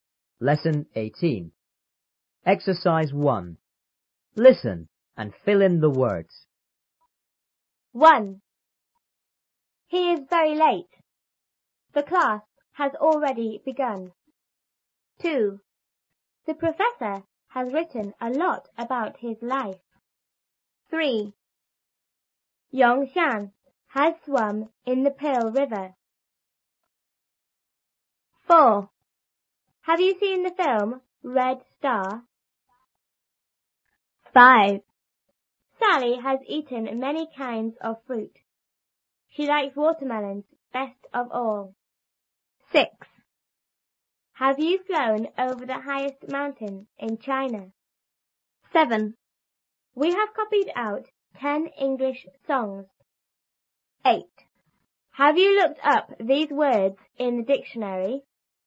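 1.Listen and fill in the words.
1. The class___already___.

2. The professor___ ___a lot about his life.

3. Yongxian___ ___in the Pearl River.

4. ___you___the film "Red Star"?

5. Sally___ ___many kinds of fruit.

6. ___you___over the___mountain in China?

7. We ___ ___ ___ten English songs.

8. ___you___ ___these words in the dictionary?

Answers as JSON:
{"1": "has; begun", "2": "has written", "3": "has swum", "4": "Have; seen", "5": "has eaten", "6": "Have; flown; highest", "7": "have copied out", "8": "Have; looked up"}

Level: 初中英语广州版3B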